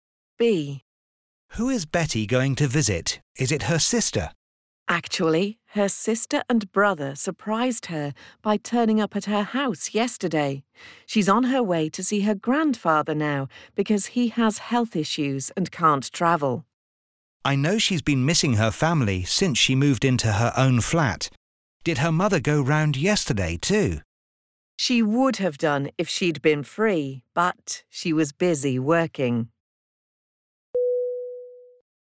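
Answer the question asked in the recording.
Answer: Her grandfather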